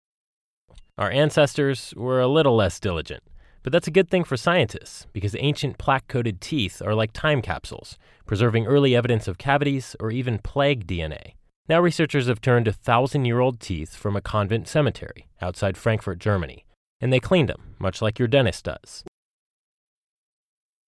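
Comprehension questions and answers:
You will hear a recording. Below is a transcription of the recording. Some words in the transcription differ from what the speaker(s) said. Please select the words that are different.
Our ancestors were a little less possessive. But that's a good thing for folks. Because ancient, plaque-coated teeth are like time capsules, converting early evidence of cavities or even plague DNA. Now researchers have turned to leveled teeth from a convent scary outside Frankfurt, Germany. And they cleaned 'em, much like your nurse does.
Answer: possessive, folks, converting, leveled, scary, nurse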